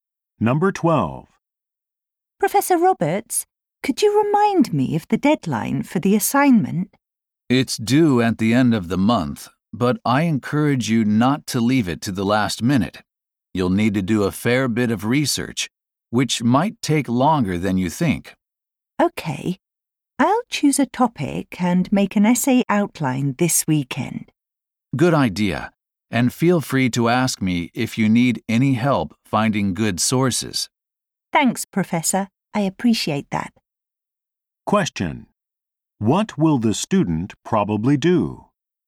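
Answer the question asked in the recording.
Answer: Choose a topic and write an essay outline this weekend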